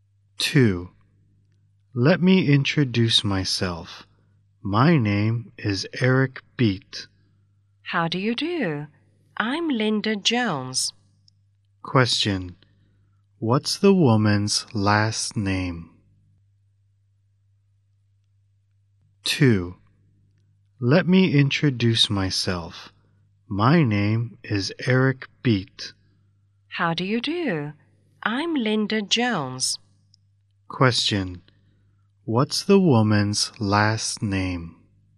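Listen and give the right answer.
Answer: Jones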